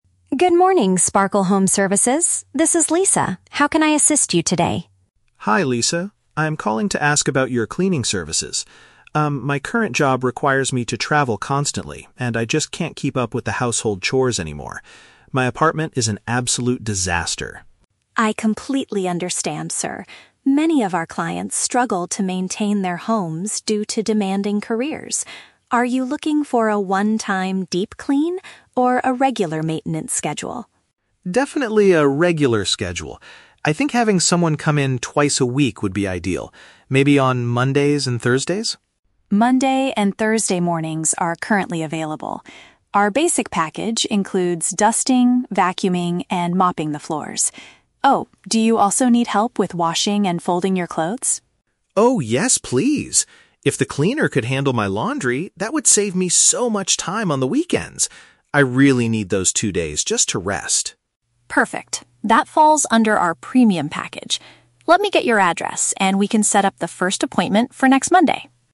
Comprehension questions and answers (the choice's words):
Listen to the phone conversation between a homeowner and an agency staff member, and choose the correct answer (A, B, or C).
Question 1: Why does the man want to hire a cleaning service?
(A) He frequently goes on business trips and lacks time for housework.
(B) He wants a one-time deep clean before a big weekend party.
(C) He is planning to move into a new apartment next Monday.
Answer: He frequently goes on business trips and lacks time for housework.

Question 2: How often does the man want the cleaner to visit his home?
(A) Every day except for the weekends.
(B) A couple of days a week.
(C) Only once a month for basic maintenance.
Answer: A couple of days a week.

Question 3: What extra chore does the man request to be included?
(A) Reorganizing his bedroom furniture.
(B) Sweeping and mopping the floors.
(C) Taking care of his laundry.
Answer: Taking care of his laundry.

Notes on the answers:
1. Mr. Evans states that his job "requires me to travel constantly," which is a paraphrase for "frequently goes on business trips." He also says he "can't keep up with the household chores" (lacks time for housework).
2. Mr. Evans requests the cleaner to come "twice a week" (Mondays and Thursdays). "A couple of days a week" is a direct paraphrase of this frequency.
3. Lisa asks if he needs help "washing and folding your clothes," and Mr. Evans excitedly agrees, saying it would be great if the cleaner could "handle my laundry."

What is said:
Lisa: Good morning, Sparkle Home Services. This is Lisa. How can I assist you today?
Evans: Hi, Lisa. I'm calling to ask about your cleaning services. Um, my current job requires me to travel constantly, and I just can't keep up with the household chores anymore. My apartment is an absolute disaster.
Lisa: I completely understand, sir. Many of our clients struggle to maintain their homes due to demanding careers. Are you looking for a one-time deep clean, or a regular maintenance schedule?
Evans: Definitely a regular schedule. I think having someone come in twice a week would be ideal. Maybe on Mondays and Thursdays?
Lisa: Monday and Thursday mornings are currently available. Our basic package includes dusting, vacuuming, and mopping the floors. Ah, do you also need help with washing and folding your clothes?
Evans: Oh, yes, please! If the cleaner could handle my laundry, that would save me so much time on the weekends. I really need those two days just to rest.
Lisa: Perfect. That falls under our premium package. Let me get your address, and we can set up the first appointment for next Monday.